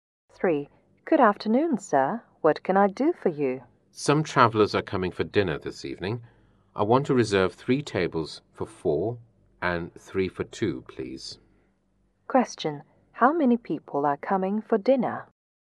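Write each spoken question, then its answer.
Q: How many people are coming for dinner?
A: 18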